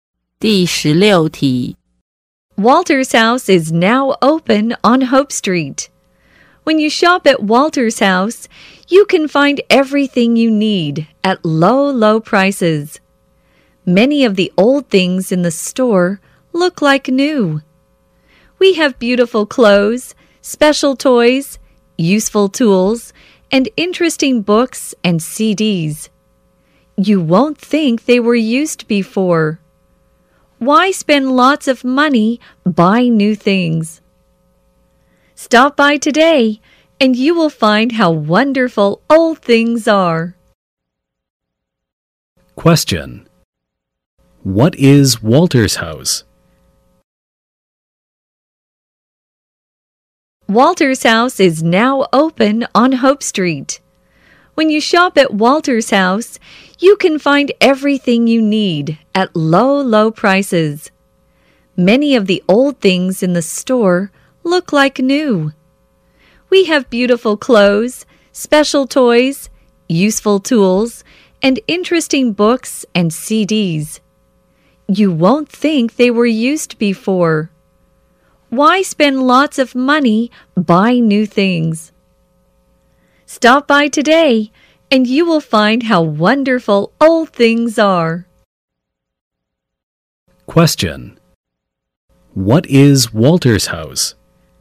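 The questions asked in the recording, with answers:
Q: What is Walter's house?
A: A secondhand store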